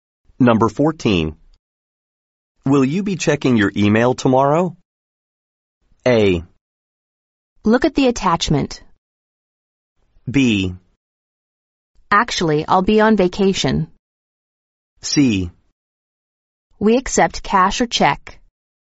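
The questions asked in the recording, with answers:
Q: Will you be checking your email tomorrow?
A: B: Actually, I'll be on vacation.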